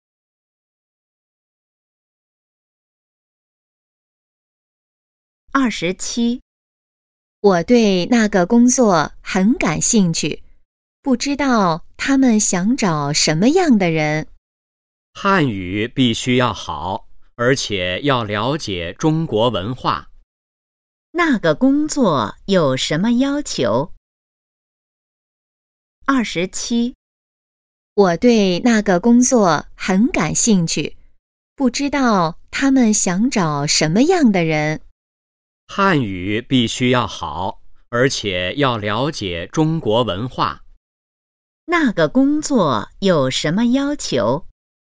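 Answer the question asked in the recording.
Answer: 汉语要好,要了解中国文化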